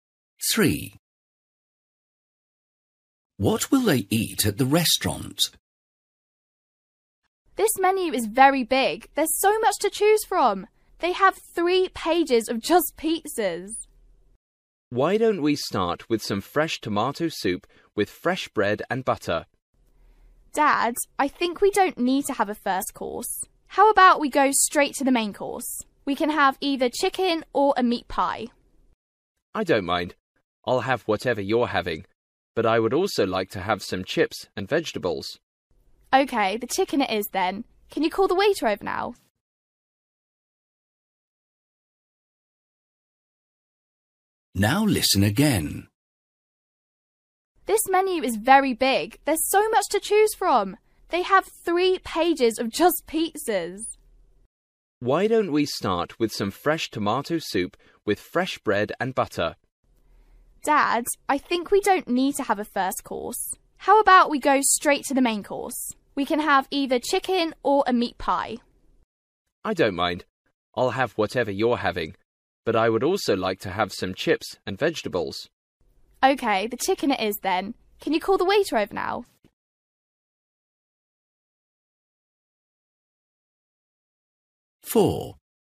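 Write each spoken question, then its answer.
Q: What will they eat at the restaurant?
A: Chicken with chips and vegetables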